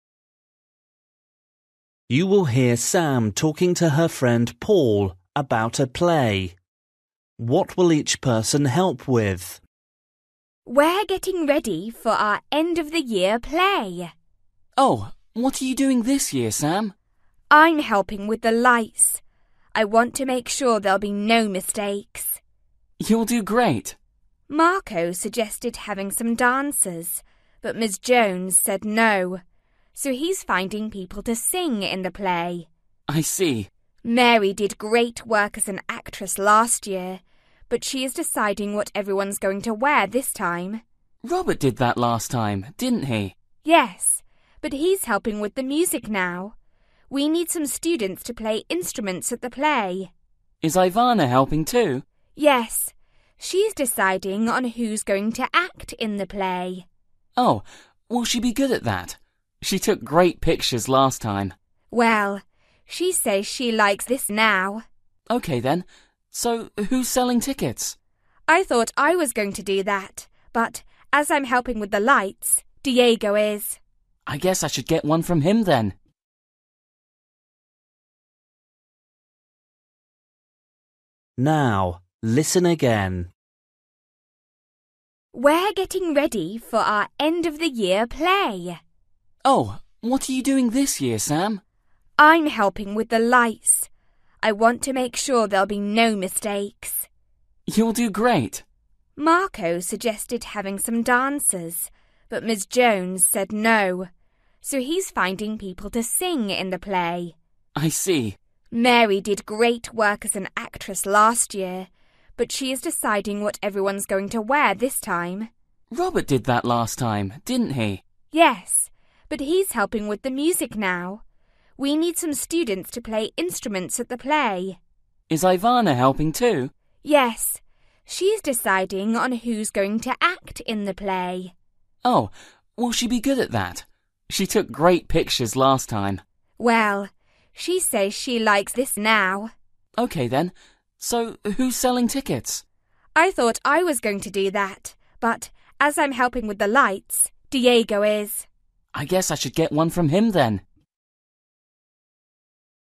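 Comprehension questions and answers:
For each question, choose the correct answer.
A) clothes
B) actors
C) lights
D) dancers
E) instruments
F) photographs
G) tickets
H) singers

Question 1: Marco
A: singers

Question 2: Mary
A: clothes

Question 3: Robert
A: instruments

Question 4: Ivanna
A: actors

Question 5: Diego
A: tickets

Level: Luyện nghe trình độ A2

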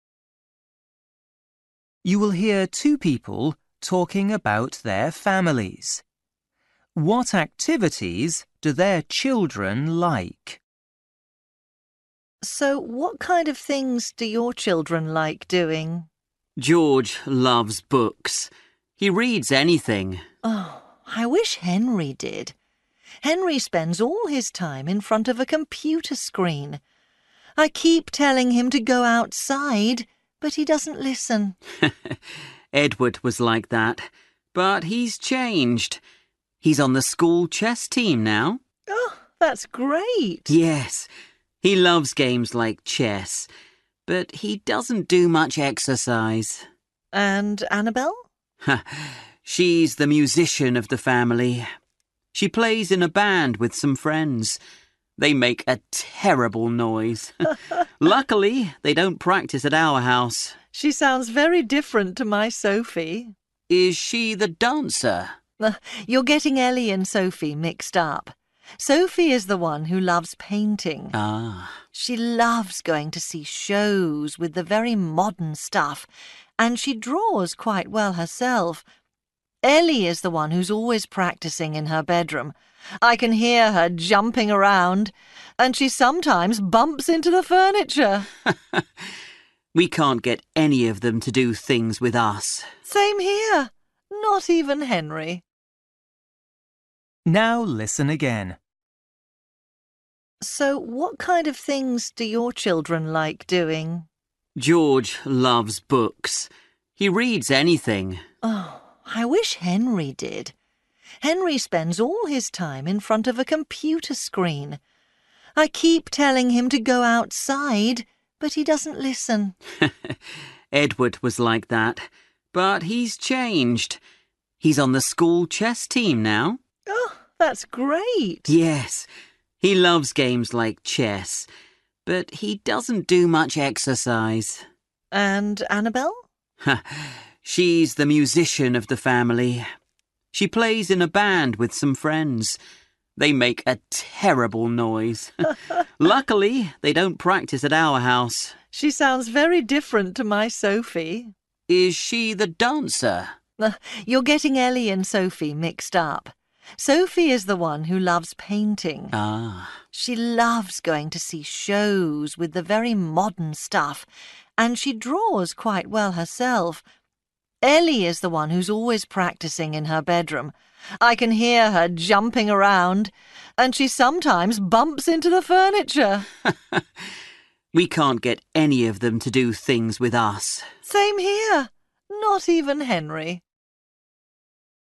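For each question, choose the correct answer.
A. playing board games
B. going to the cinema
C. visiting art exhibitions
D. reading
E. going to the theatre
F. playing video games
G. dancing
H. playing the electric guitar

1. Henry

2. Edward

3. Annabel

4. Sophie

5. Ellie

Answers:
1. playing video games
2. playing board games
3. playing the electric guitar
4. visiting art exhibitions
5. dancing

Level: Luyện nghe trình độ A2

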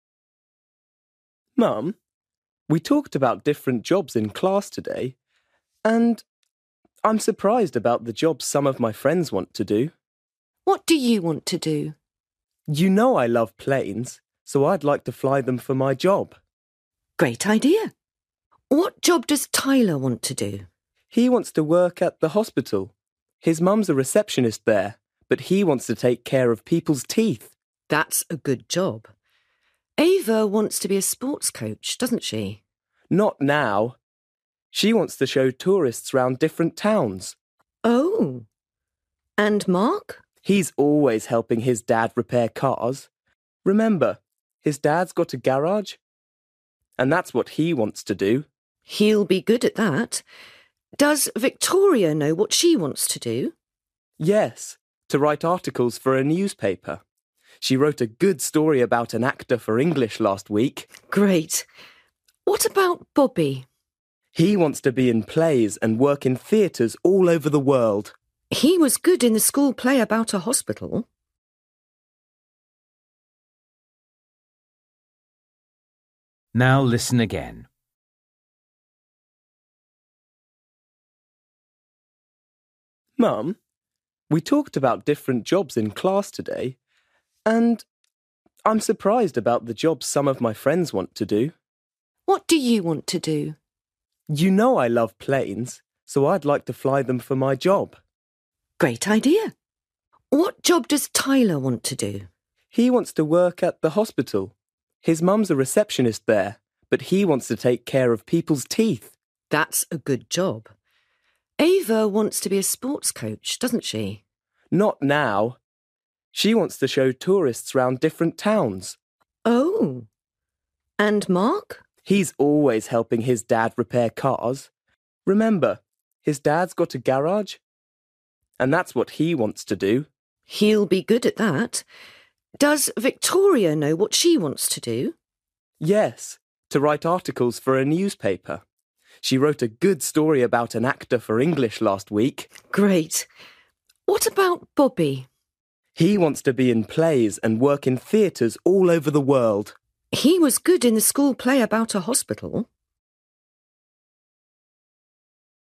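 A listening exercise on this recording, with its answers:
For each question, choose the correct answer.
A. actor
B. coach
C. dentist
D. journalist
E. mechanic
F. pilot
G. receptionist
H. tour guide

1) Tyler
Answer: dentist

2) Ava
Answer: tour guide

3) Mark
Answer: mechanic

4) Victoria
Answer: journalist

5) Bobby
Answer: actor

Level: Luyện nghe trình độ A2

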